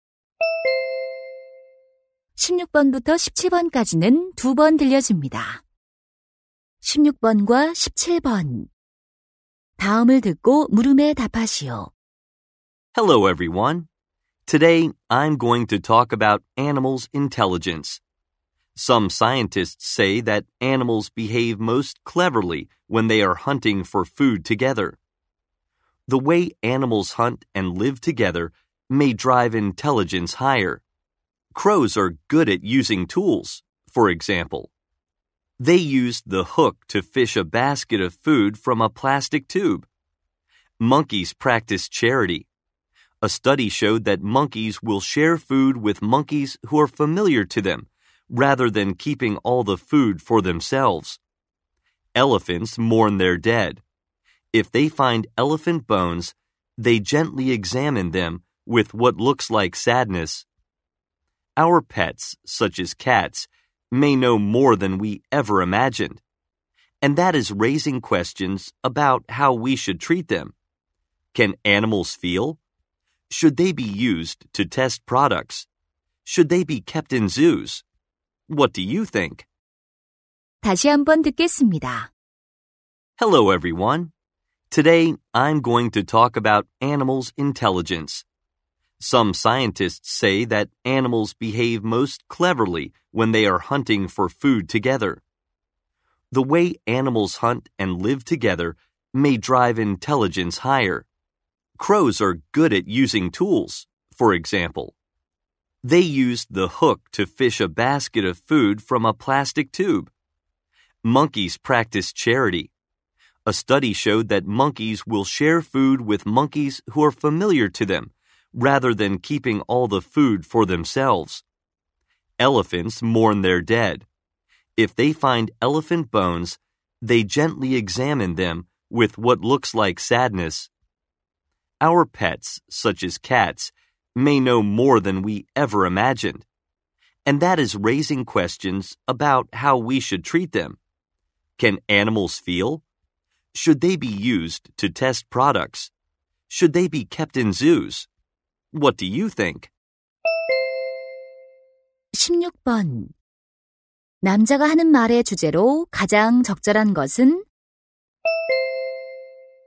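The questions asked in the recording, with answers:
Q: 남자가 하는 말의 주제로 가장 적절한 것은?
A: 동물의 지능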